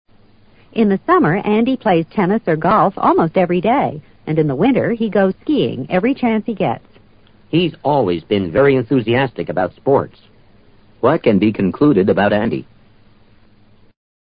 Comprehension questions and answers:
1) What can be concluded about Andy?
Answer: Sports are quite important to him.